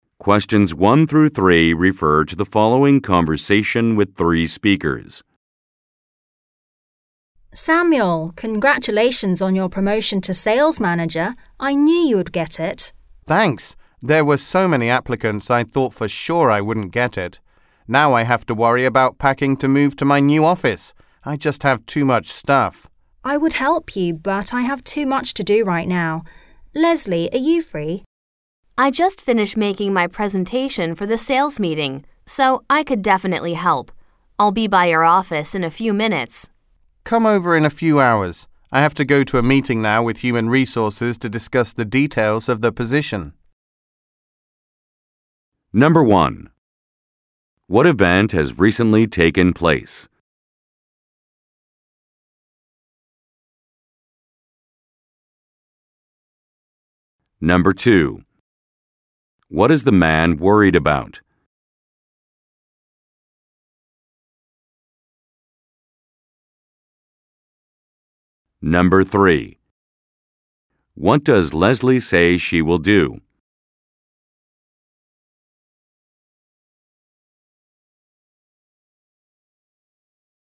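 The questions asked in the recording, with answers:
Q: What event has recently taken place?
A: Samuel was promoted to sales manager

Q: What is the man worried about?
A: Packing to move to his new office

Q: What does Leslie say she will do?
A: Help him pack for the move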